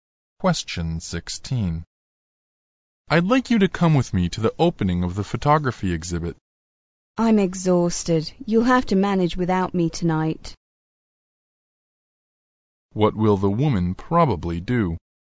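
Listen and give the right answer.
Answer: Stay home and rest instead of going to the exhibit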